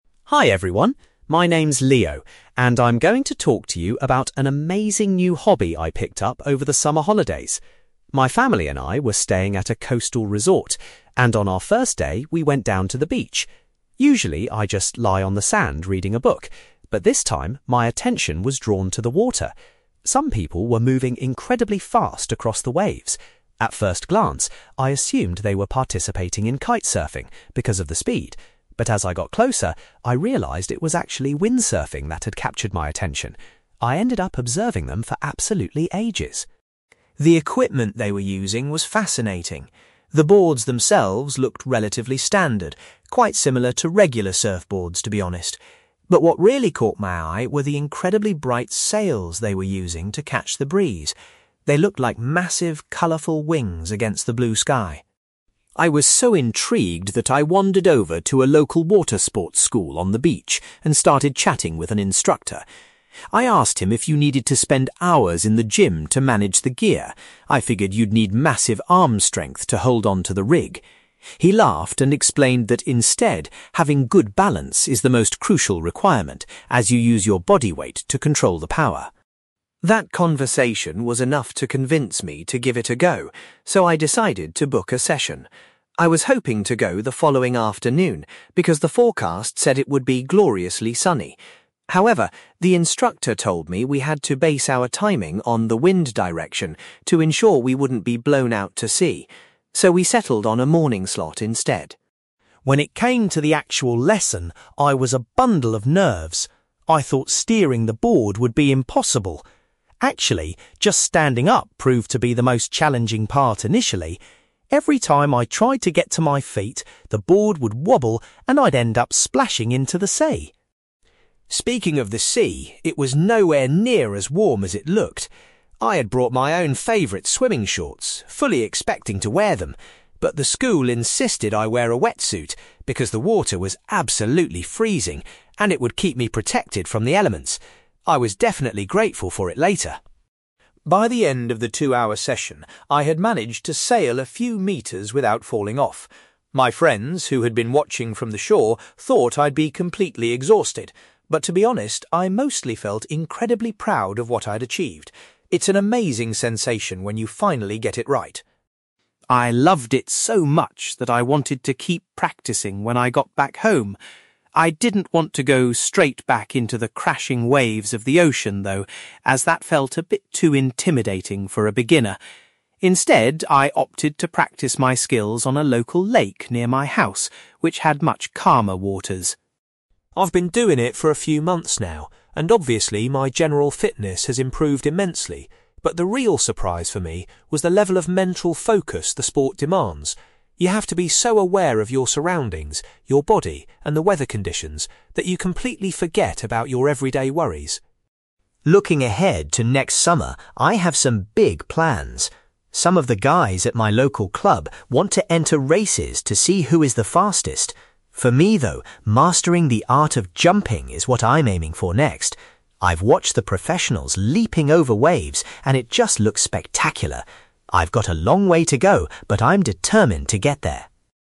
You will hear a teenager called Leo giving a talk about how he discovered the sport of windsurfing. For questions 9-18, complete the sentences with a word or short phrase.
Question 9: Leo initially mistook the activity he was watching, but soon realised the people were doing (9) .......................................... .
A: windsurfing

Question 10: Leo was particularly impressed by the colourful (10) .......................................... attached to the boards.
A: sails

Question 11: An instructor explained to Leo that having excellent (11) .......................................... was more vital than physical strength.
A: balance

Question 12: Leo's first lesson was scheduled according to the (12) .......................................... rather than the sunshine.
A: wind direction

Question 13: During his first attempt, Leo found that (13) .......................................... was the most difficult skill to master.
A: standing up

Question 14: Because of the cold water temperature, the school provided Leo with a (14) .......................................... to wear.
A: wetsuit

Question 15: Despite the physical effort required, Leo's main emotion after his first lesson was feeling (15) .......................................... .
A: proud

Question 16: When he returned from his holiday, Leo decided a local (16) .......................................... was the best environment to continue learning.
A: lake

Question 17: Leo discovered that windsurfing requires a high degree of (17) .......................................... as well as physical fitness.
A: mental focus

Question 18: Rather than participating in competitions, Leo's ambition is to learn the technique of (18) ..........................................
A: jumping

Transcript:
Leo: Hi everyone! My name's Leo, and I'm going to talk to you about an amazing new hobby I picked up over the summer holidays. My family and I were staying at a coastal resort, and on our first day, we went down to the beach. Usually, I just lie on the sand reading a book, but this time, my attention was drawn to the water. Some people were moving incredibly fast across the waves. At first glance, I assumed they were participating in kitesurfing because of the speed, but as I got closer, I realised it was actually windsurfing that had captured my attention. I ended up observing them for absolutely ages.
The equipment they were using was fascinating. The boards themselves looked relatively standard, quite similar to regular surfboards, to be honest. But what really caught my eye were the incredibly bright sails they were using to catch the breeze. They looked like massive, colourful wings against the blue sky.
I was so intrigued that I wandered over to a local water sports school on the beach and started chatting with an instructor. I asked him if you needed to spend hours in the gym to manage the gear. I figured you'd need massive arm strength to hold onto the rig. He laughed and explained that instead, having good balance is the most crucial requirement, as you use your body weight to control the power.
That conversation was enough to convince me to give it a go, so I decided to book a session. I was hoping to go the following afternoon because the forecast said it would be gloriously sunny. However, the instructor told me we had to base our timing on the wind direction to ensure we wouldn't be blown out to sea. So, we settled on a morning slot instead.
When it came to the actual lesson, I was a bundle of nerves. I thought steering the board would be impossible. Actually, just standing up proved to be the most challenging part initially. Every time I tried to get to my feet, the board would wobble, and I'd end up splashing into the sea!
Speaking of the sea, it was nowhere near as warm as it looked. I had brought my own favourite swimming shorts, fully expecting to wear them. But the school insisted I wear a wetsuit because the water was absolutely freezing, and it would keep me protected from the elements. I was definitely grateful for it later!
By the end of the two-hour session, I had managed to sail a few metres without falling off. My friends, who had been watching from the shore, thought I'd be completely exhausted. But to be honest, I mostly felt incredibly proud of what I'd achieved. It's an amazing sensation when you finally get it right.
I loved it so much that I wanted to keep practising when I got back home. I didn't want to go straight back into the crashing waves of the ocean, though, as that felt a bit too intimidating for a beginner. Instead, I opted to practice my skills on a local lake near my house, which had much calmer waters.
I've been doing it for a few months now, and obviously, my general fitness has improved immensely. But the real surprise for me was the level of mental focus the sport demands. You have to be so aware of your surroundings, your body, and the weather conditions that you completely forget about your everyday worries.
Looking ahead to next summer, I have some big plans. Some of the guys at my local club want to enter races to see who is the fastest. For me, though, mastering the art of jumping is what I'm aiming for next. I've watched the professionals leaping over waves, and it just looks spectacular. I've got a long way to go, but I'm determined to get there!

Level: B2